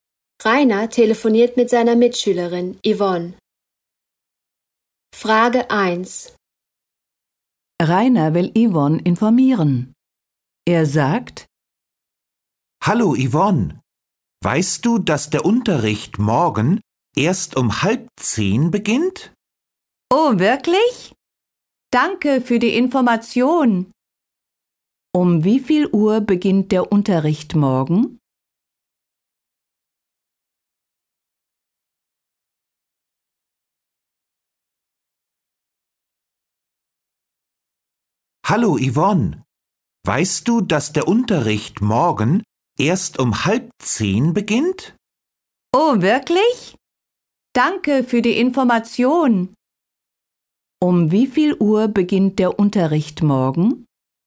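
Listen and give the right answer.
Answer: Um 9:30 Uhr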